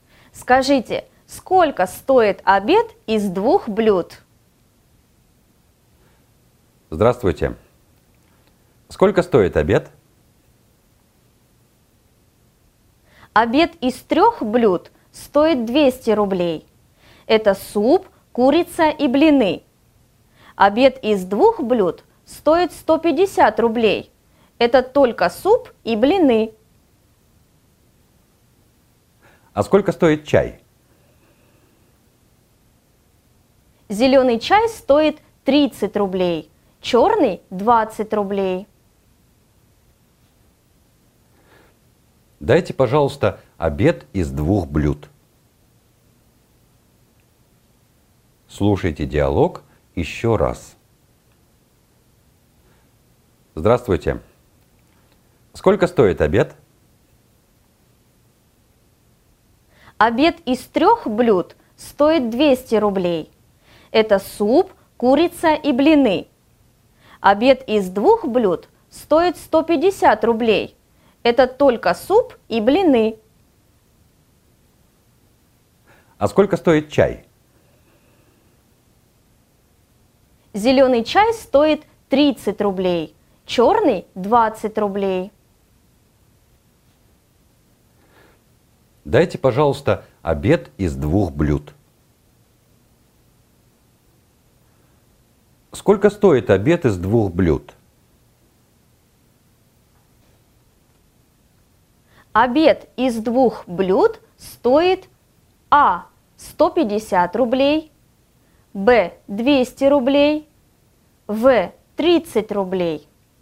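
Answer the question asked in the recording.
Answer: А: 150 рублей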